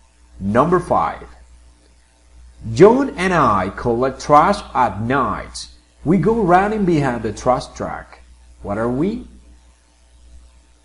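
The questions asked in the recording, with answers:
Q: What are we?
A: garbage collectors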